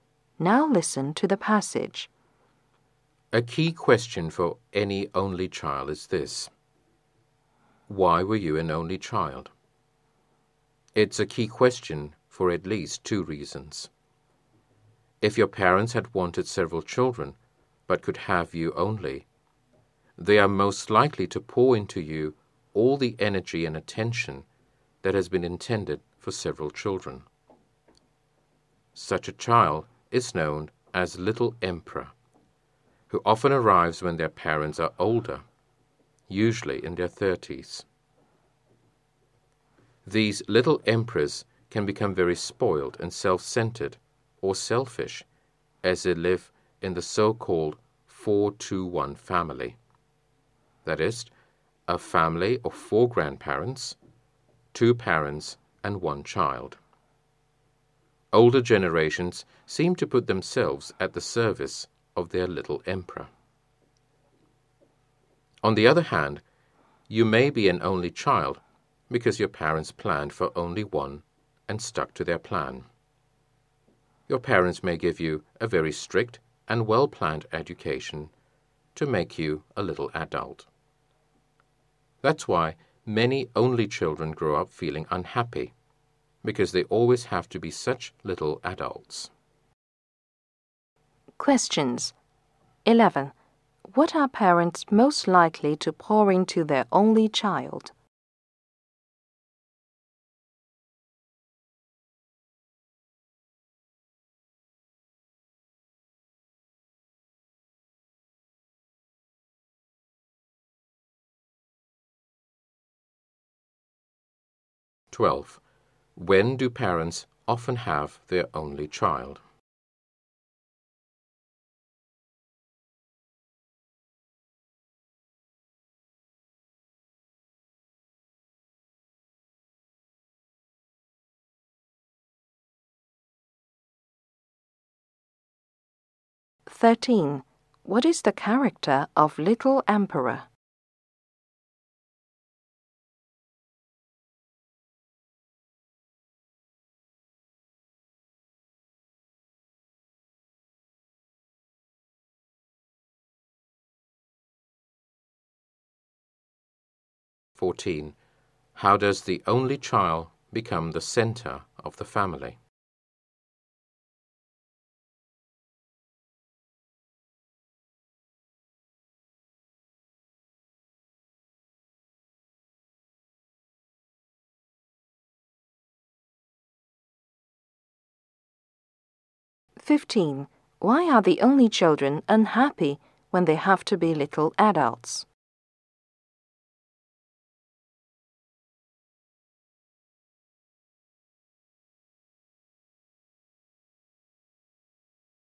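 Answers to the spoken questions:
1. All their energy and attention
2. When they are older, usually in their 30s
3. Spoiled and self-centered
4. Older generations serve the little emperor
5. Because of a very strict, well-planned education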